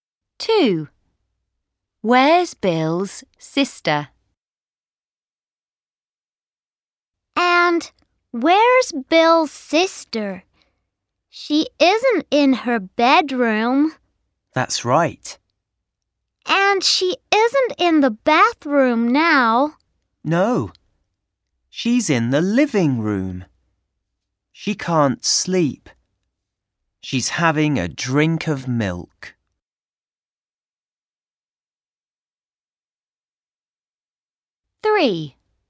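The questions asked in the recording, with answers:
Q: Where's Bill's sister?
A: In the living room.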